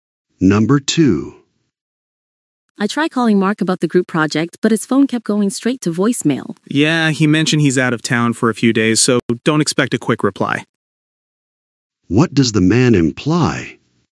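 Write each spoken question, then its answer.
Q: What does the man imply?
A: Mark is out of town and won't reply quickly.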